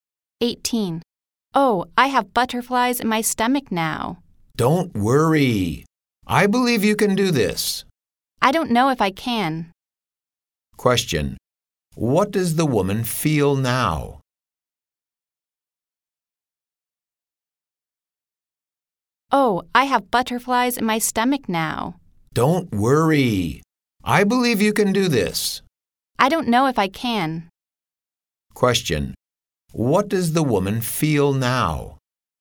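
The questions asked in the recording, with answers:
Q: What does the woman feel now?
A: Nervous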